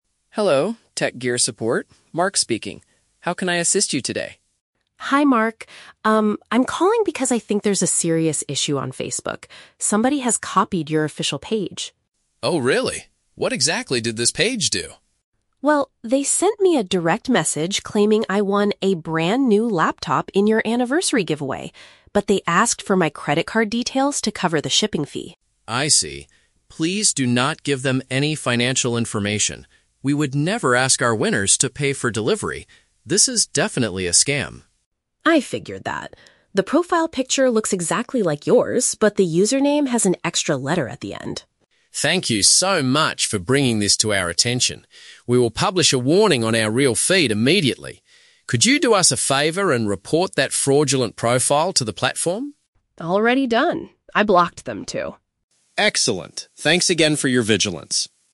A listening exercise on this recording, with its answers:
Listen to a phone conversation between a customer and a support agent. For each question, choose the correct answer (A, B, or C).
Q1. What is the main reason for the woman's phone call?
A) To claim a computer she won in a recent competition.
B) To inform the company about a deceptive online profile.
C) To complain about a late delivery of her purchased goods.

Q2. What made the woman suspicious of the message she received?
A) The sender requested money for transporting the item.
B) The account's image was completely different from the real one.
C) The message was sent from an email address instead of Facebook.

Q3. What does Mark say the business will do next?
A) Send a free laptop to the woman to thank her.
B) Contact the local police to investigate the stolen credit card.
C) Alert their followers about the situation on their main page.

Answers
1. B) To inform the company about a deceptive online profile.
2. A) The sender requested money for transporting the item.
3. C) Alert their followers about the situation on their main page.

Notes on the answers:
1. Lisa calls because somebody "copied your official page," which means she wants to inform them about a deceptive online profile (fake account). Option (A) is a trap; the message claimed she won a computer, but she knows it is a lie so she is not calling to claim it. Option (C) is a trap; the words "shipping" and "delivery" are mentioned, but she is not complaining about a late delivery.
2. Lisa says they asked for her credit card details "to cover the shipping fee," which means requesting money for transporting the item. Option (B) is a trap; she explicitly says the profile picture "looks exactly like yours" (not completely different). Option (C) is not mentioned.
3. Mark states that the company will "publish a warning on our real feed immediately," which means alerting their followers on their main page. Option (A) is not mentioned. Option (B) is a trap; Mark mentions "financial information" and "credit card," but her card was not stolen and the police are not mentioned.

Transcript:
Mark: Hello, TechGear Support, Mark speaking. How can I assist you today?
Lisa: Hi Mark. Um, I'm calling because I think there's a serious issue on Facebook. Somebody has copied your official page.
Mark: Oh, really? What exactly did this page do?
Lisa: Well, they sent me a direct message claiming I won a brand new laptop in your anniversary giveaway. But they asked for my credit card details to cover the shipping fee.
Mark: I see. Please do not give them any financial information. We would never ask our winners to pay for delivery. This is definitely a scam.
Lisa: I figured that. The profile picture looks exactly like yours, but the username has an extra letter at the end.
Mark: Thank you so much for bringing this to our attention. We will publish a warning on our real feed immediately. Could you do us a favor and report that fraudulent profile to the platform?
Lisa: Already done. I blocked them, too.
Mark: Excellent. Thanks again for your vigilance.

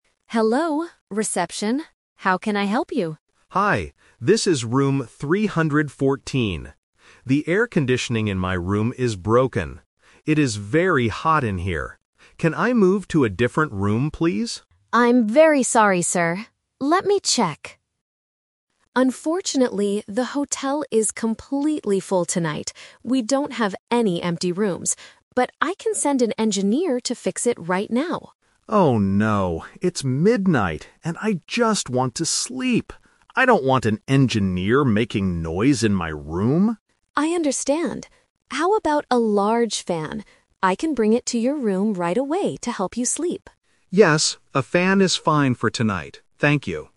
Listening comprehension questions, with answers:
Listen to a phone conversation between a hotel guest and a receptionist. Choose the correct answer (A, B, or C) for each question.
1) What is the problem with the man's room?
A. The room is too cold.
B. The air conditioning is not working.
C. There is a lot of noise outside.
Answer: B. The air conditioning is not working.

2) What did the guest want to do at first?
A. Call a repair engineer.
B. Ask for a large fan.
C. Move to a different room.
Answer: C. Move to a different room.

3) What will the receptionist do next?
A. Bring a fan to room 314.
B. Send an engineer to fix the air conditioning.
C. Give the guest the keys to a new room.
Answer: A. Bring a fan to room 314.

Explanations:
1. The guest clearly states, "The air conditioning in my room is broken." Option (B) uses "not working" to paraphrase "broken". Option (A) is a trap; ACs usually make rooms cold, but since it's broken, the room is "very hot." Option (C) is a trap using the word "noise" (which the guest mentions later about the engineer).
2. At the beginning of the call, the guest asks: "Can I move to a different room, please?" Option (A) and (B) are solutions offered by the receptionist later in the conversation, not the guest's initial request.
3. This is The Twist. The guest couldn't change rooms and didn't want the engineer, so the receptionist asked, "How about a large fan? I can bring it to your room..." and the guest agreed. Option (B) is the trap (the rejected offer). Option (C) is a trap (the original request that couldn't be fulfilled because the hotel was full).

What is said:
Receptionist: Hello, reception. How can I help you?
Guest: Hi. This is room 314. The air conditioning in my room is broken. It is very hot in here. Can I move to a different room, please?
Receptionist: I'm very sorry, sir. Let me check... Unfortunately, the hotel is completely full tonight. We don't have any empty rooms. But I can send an engineer to fix it right now.
Guest: Oh, no. It's midnight and I just want to sleep. I don't want an engineer making noise in my room.
Receptionist: I understand. How about a large fan? I can bring it to your room right away to help you sleep.

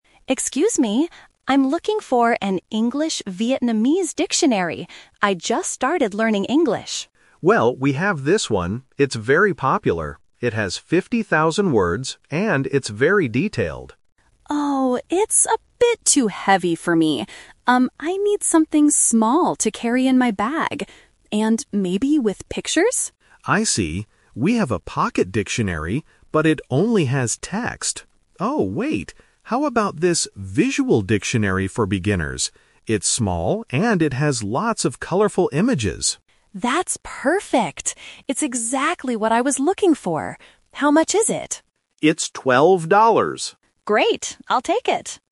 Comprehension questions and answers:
Listen to the conversation and circle the correct answer (A, B, or C).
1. What kind of dictionary does the customer want?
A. A large and detailed dictionary.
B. A small dictionary with pictures.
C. A pocket dictionary with only text.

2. Why did the customer dislike the first dictionary?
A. Because it was too expensive.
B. Because it didn't have enough words.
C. Because it was too heavy.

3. Which dictionary did the customer finally buy?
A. The "Visual Dictionary for Beginners".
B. The pocket dictionary.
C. An English grammar book.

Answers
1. B. A small dictionary with pictures.
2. C. Because it was too heavy.
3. A. The "Visual Dictionary for Beginners".

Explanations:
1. The customer explicitly asks for these features: "I need something small to carry in my bag. And maybe with pictures?" Why the trap is wrong: Option (A) is what the clerk offered first, but the customer rejected it. Option (C) is a pocket dictionary mentioned by the clerk, but the customer didn't want it because it lacked pictures.
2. When shown the first dictionary, the customer says, "Oh, it's a bit too heavy for me." Why the trap is wrong: Option (A) is a trap. The price is mentioned at the end ($12), but it wasn't the reason for rejecting the first book. Option (B) is wrong because the first book actually had too many words (50,000) for a beginner.
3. The clerk suggests this one because it's small and has images, and the customer says, "That's perfect!... I'll take it." Why the trap is wrong: Option (B) is the trap. The clerk mentioned the pocket dictionary, but the customer chose the visual one instead. Option (C) was not mentioned in the audio.

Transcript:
Customer: Excuse me, I'm looking for an English-Vietnamese dictionary. I just started learning English.
Clerk: Well, we have this one. It's very popular. It has fifty thousand words and it's very detailed.
Customer: Oh, it's a bit too heavy for me. Um, I need something small to carry in my bag. And maybe with pictures?
Clerk: I see. We have a pocket dictionary, but it only has text. Oh, wait! How about this "Visual Dictionary for Beginners"? It's small and it has lots of colorful images.
Customer: That's perfect! It's exactly what I was looking for. How much is it?

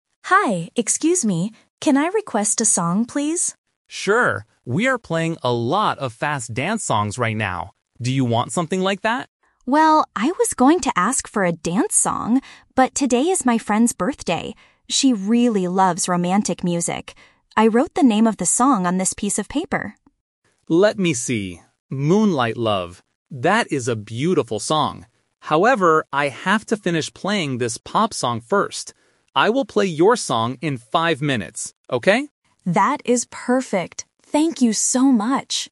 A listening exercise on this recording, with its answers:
Listen to the conversation between a customer and a DJ. Choose the correct answer (A, B, or C) for each question.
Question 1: What kind of song does the woman request?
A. A fast dance song.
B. A romantic song.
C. A pop song.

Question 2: Why does the woman request this song?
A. Because it is her friend's birthday.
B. Because she wants to dance with her friend.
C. Because it is the DJ's favorite song.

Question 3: When will the DJ play the requested song?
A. Right now.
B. Tomorrow night.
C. In five minutes.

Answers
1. B. A romantic song.
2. A. Because it is her friend's birthday.
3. C. In five minutes.

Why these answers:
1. The woman says, "She really loves romantic music." Option (A) is the A2 Twist/Trap; the DJ suggests a fast dance song and the woman "was going to ask" for one, but she changed her mind. Option (C) is a trap because a pop song is what the DJ is playing right now, not what the woman requested.
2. The woman gives a clear reason: "...but today is my friend's birthday." Option (B) is a trap using the word "dance" from earlier in the conversation. Option (C) is plausible in real life but is not mentioned in the audio.
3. The DJ says, "I will play your song in five minutes, okay?" and the woman agrees. Option (A) is a trap because the woman wants it, but the DJ has to finish the current song first ("However, I have to finish playing this pop song first"). Option (B) is not mentioned in the conversation.

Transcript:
Woman: Hi, excuse me. Can I request a song, please?
Man: Sure! We are playing a lot of fast dance songs right now. Do you want something like that?
Woman: Well, I was going to ask for a dance song, but today is my friend's birthday. She really loves romantic music. I wrote the name of the song on this piece of paper.
Man: Let me see... "Moonlight Love". That is a beautiful song. However, I have to finish playing this pop song first. I will play your song in five minutes, okay?

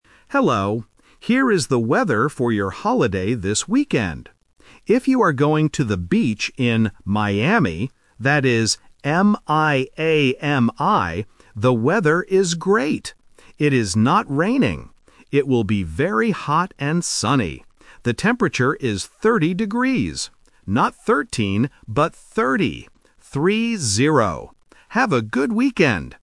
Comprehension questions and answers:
Listen to the weather forecast and choose the correct answer (A, B, or C).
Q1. How does the reporter spell the name of the city?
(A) M-A-I-M-I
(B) M-I-A-M-I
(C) M-I-A-M-Y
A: (B) M-I-A-M-I

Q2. What will the weather be like this weekend?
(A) Hot and sunny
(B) Cold and raining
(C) Cloudy and windy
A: (A) Hot and sunny

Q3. What is the temperature?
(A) 13 degrees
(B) 30 degrees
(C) 3 degrees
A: (B) 30 degrees

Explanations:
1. The reporter spells the city name clearly: M-I-A-M-I. Option (A) swaps the "I" and "A", and Option (C) ends with a "Y", which are common spelling traps for beginners.
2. The reporter says, "It will be very hot and sunny." Option (B) is the trap because the word "raining" is mentioned, but in a negative sentence: "It is not raining." Option (C) is not mentioned.
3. The reporter states the temperature is 30 degrees. He also clarifies, "Not 13, but 30. Three-zero." Option (A) is the trap for students who have trouble distinguishing between the "-teen" and "-ty" sounds.

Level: A1

